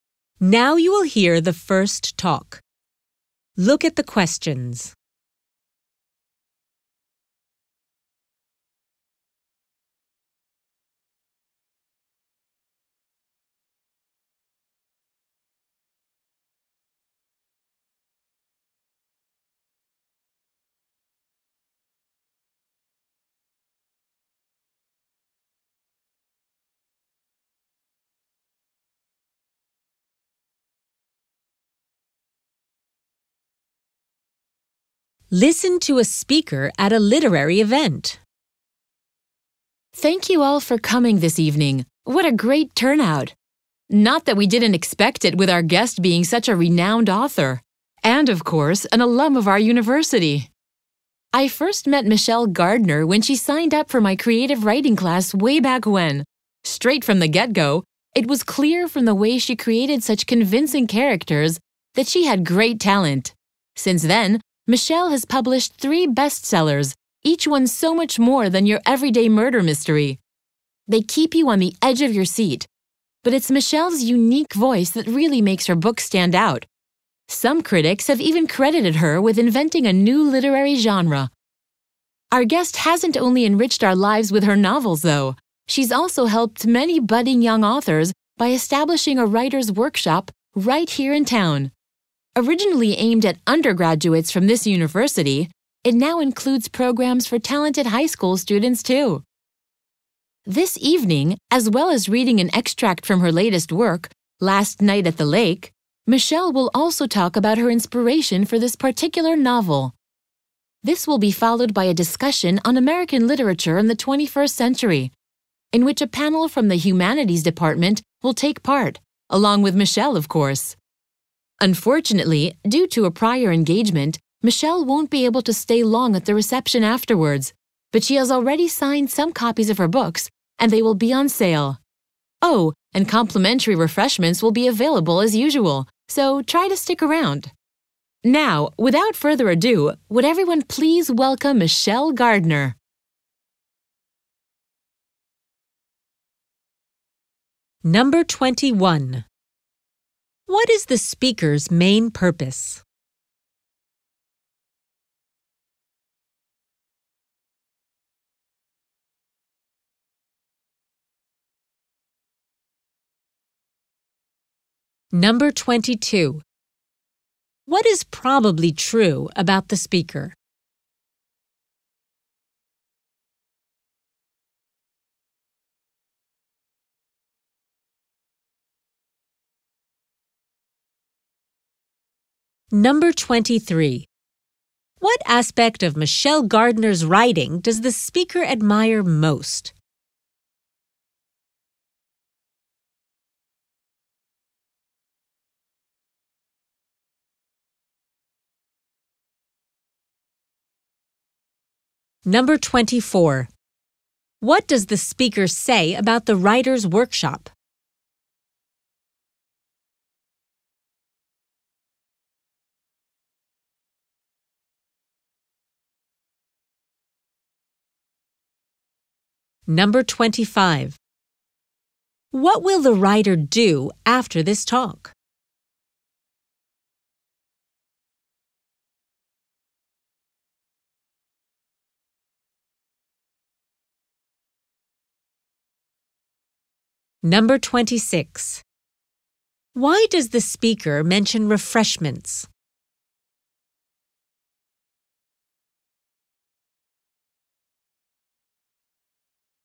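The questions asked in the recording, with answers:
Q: What is the speaker's main purpose?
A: To introduce the guest author Michelle Gardner

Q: What is probably true about the speaker?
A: He/she taught Michelle creative writing at the university

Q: What aspect of Michelle Gardner's writing does the speaker admire most?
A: Her unique voice

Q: What does the speaker say about the writer's workshop?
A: It now includes programs for talented high school students too

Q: What will the writer do after this talk?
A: Read an extract from her latest novel and talk about her inspiration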